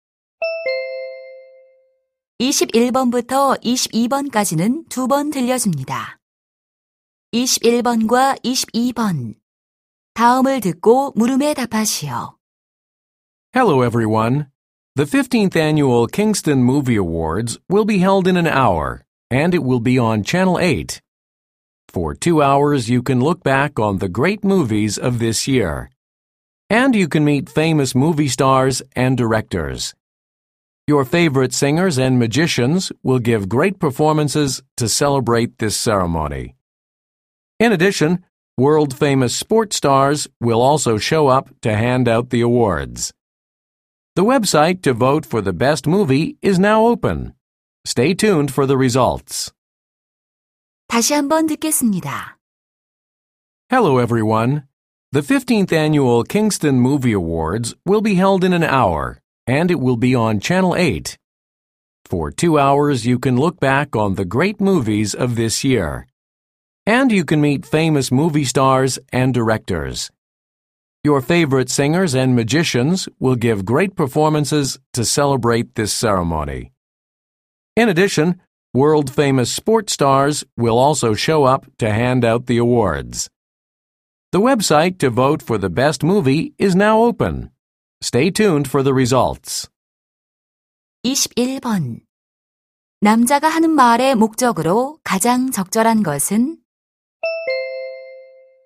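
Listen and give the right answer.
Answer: 영화 시상식 방송을 안내하려고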